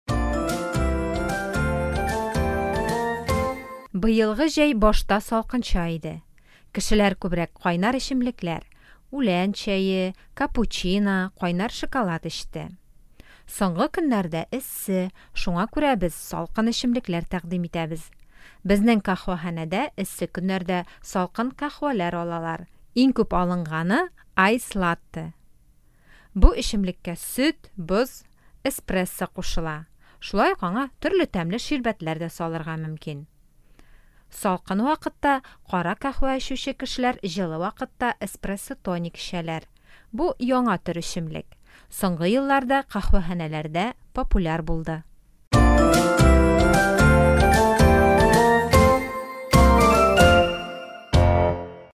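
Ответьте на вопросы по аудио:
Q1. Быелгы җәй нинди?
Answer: Башта салкынча иде, соңгы көннәрдә эссе

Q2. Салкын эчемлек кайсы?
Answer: Айс-латте (салкын каһвә)

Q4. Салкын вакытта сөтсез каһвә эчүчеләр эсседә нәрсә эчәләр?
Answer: Эспрессо-тоник

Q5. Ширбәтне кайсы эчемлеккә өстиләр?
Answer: Айс-латтега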